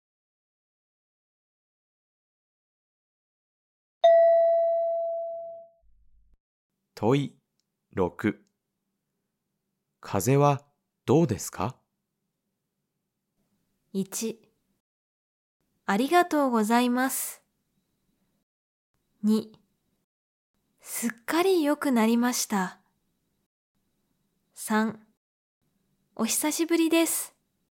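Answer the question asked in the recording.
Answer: 2: すっかり良くなりました。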